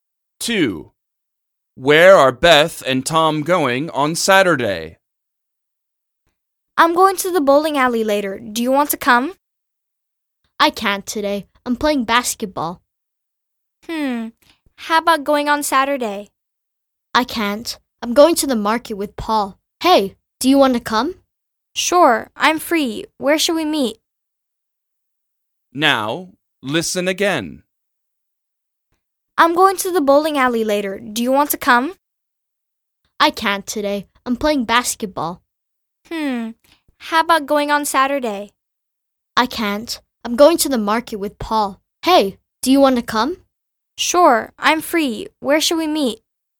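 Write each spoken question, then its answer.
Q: Where are Beth and Tom going on Saturday?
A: To the market.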